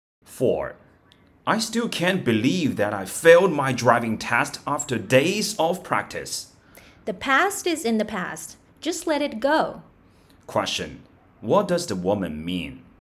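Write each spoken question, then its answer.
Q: What does the woman mean?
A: The man should forget about failing the test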